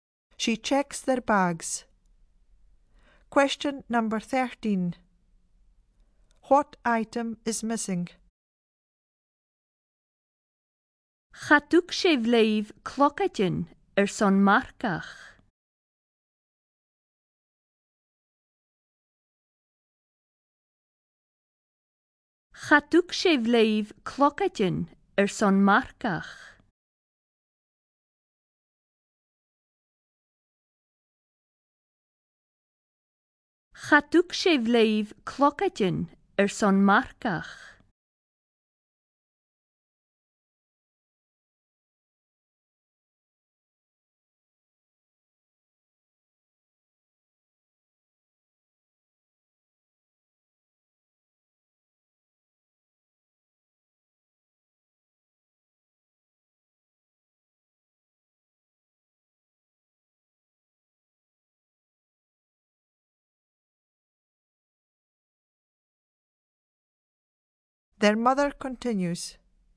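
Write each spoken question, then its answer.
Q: What item is missing?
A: A riding helmet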